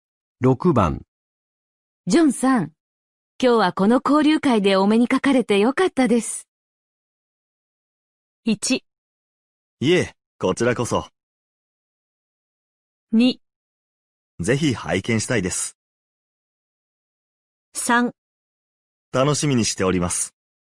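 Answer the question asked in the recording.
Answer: 1: いえ、こちらこそ。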